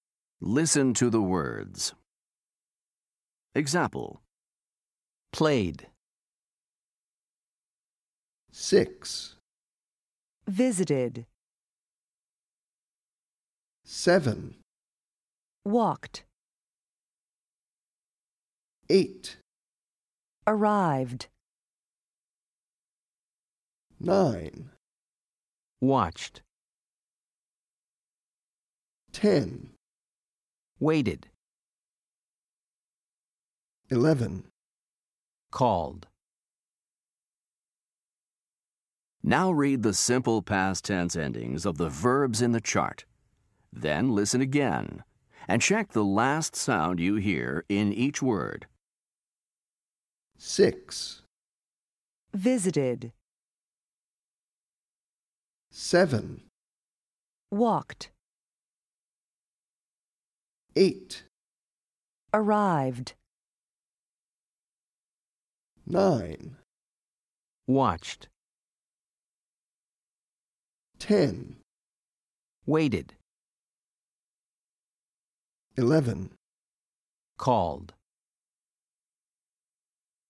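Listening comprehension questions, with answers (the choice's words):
Listen to the words. Then choose the last sound you hear in each word.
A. /t/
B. /d/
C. /Id/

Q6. visited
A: /Id/

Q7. walked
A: /t/

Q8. arrived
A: /d/

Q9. watched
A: /t/

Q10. waited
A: /Id/

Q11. called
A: /d/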